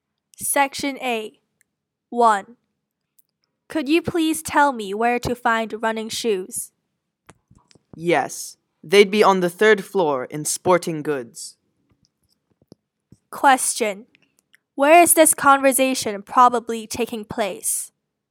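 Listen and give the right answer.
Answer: In a department store (the sporting goods section)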